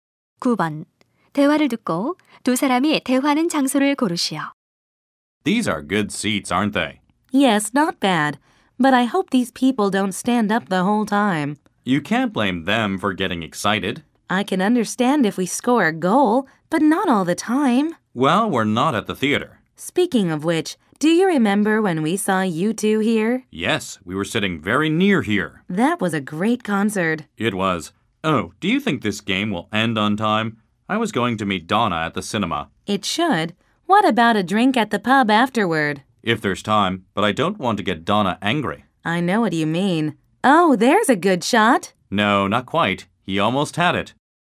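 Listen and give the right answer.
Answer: 축구 경기장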